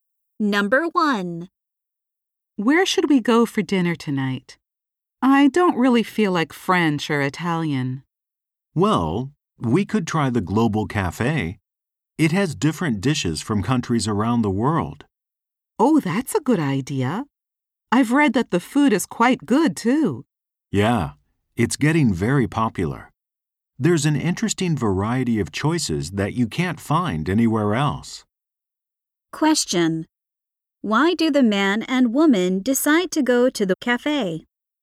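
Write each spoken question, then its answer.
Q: Why do the man and woman decide to go to the cafe?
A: It serves a unique variety of dishes from around the world.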